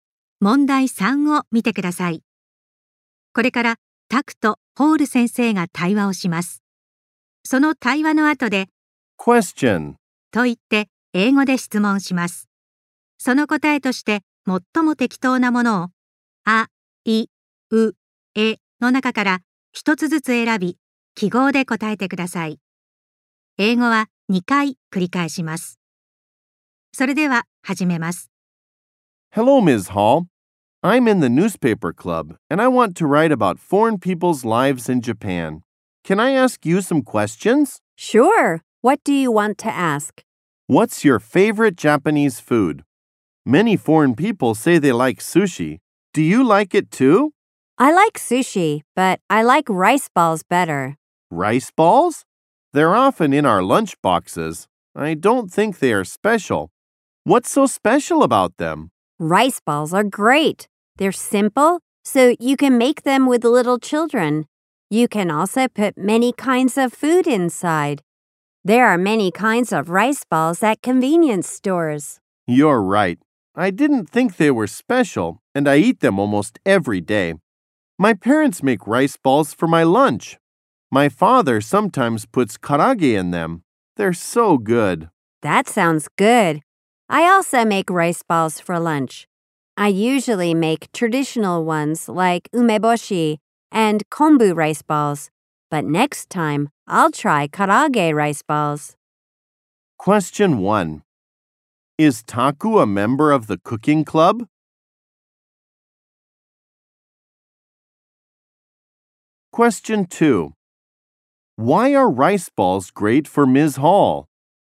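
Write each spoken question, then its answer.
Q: Is Taku a member of the cooking club?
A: No, he is in the newspaper club.

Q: Why are rice balls great for Ms.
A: Because they are simple, so you can make them with little children, and you can put many kinds of food inside.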